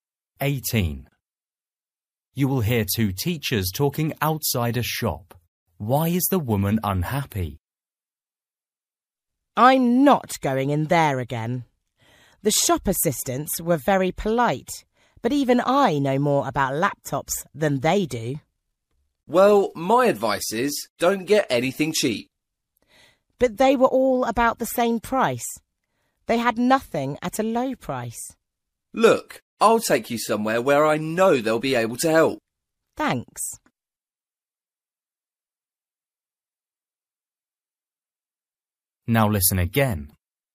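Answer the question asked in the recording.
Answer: The shop assistants didn't know much about laptops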